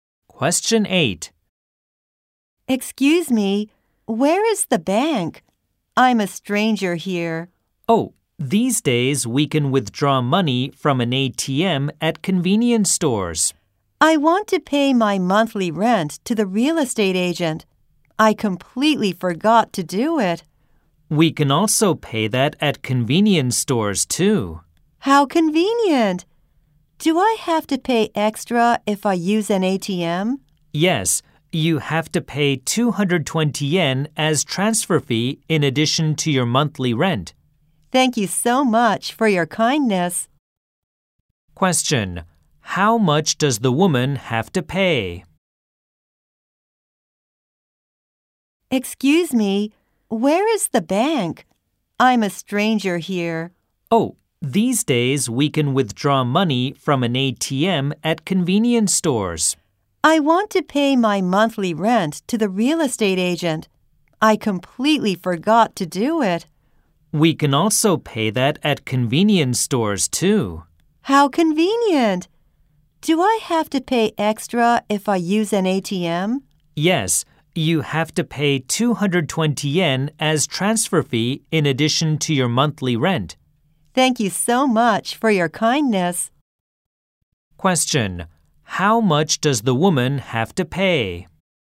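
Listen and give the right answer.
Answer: Her monthly rent plus a 220-yen transfer fee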